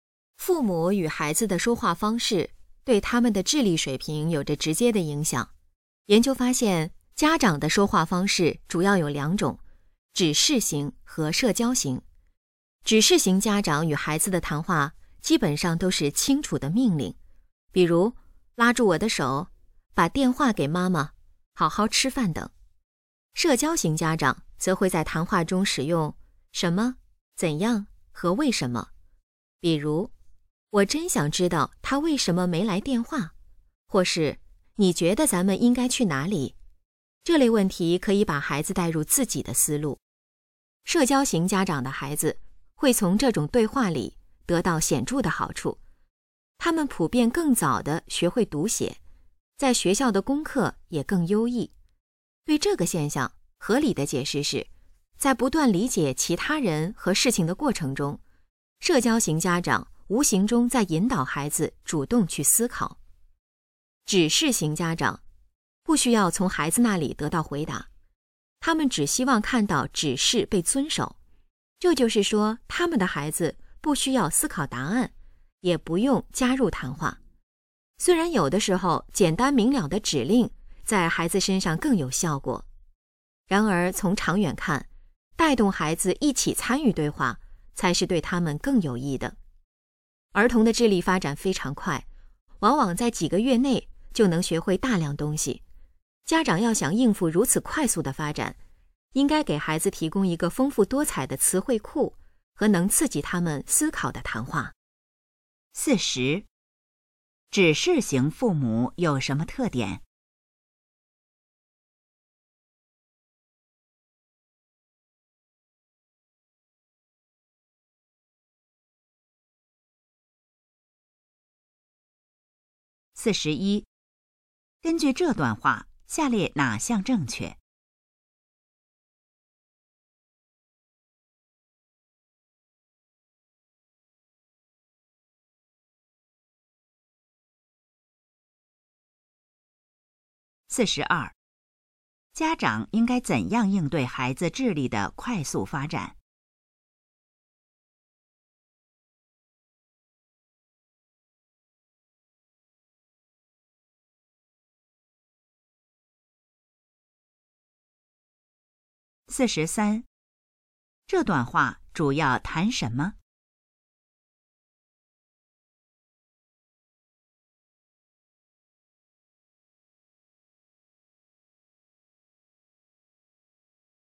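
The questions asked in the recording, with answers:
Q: 指示型父母有什么特点?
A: 与孩子谈话基本都是清楚的命令

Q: 家长应该怎样应对孩子智力的快速发展?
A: 提供丰富的词汇库和刺激思考的谈话

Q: 这段话主要谈什么?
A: 父母说话方式对孩子智力的影响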